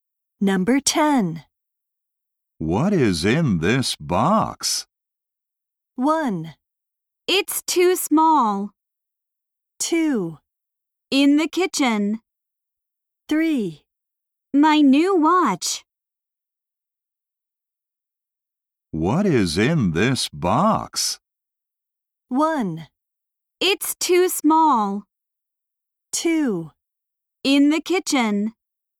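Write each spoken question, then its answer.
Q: What is in this box?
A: 3: My new watch.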